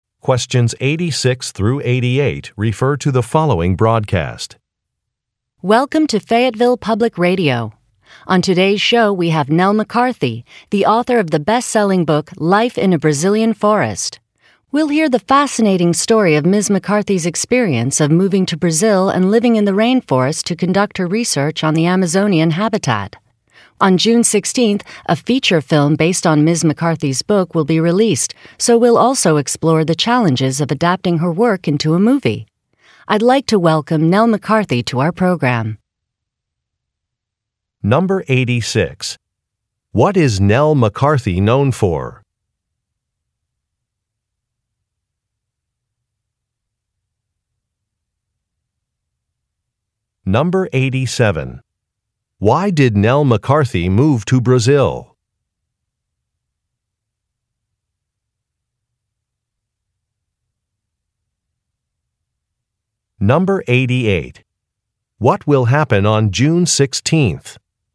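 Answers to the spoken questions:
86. Writing the best-selling book Life in a Brazilian Forest
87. To conduct research on the Amazonian habitat
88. A movie based on her book will be released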